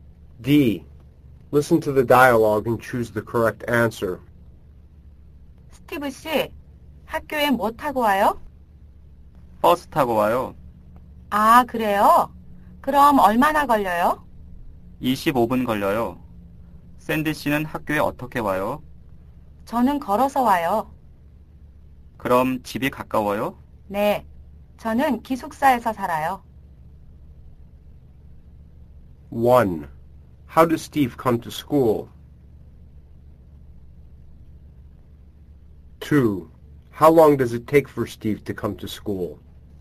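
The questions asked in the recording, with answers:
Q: How does Steve come to school?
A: By bus.

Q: How long does it take for Steve to come to school?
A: 25 minutes.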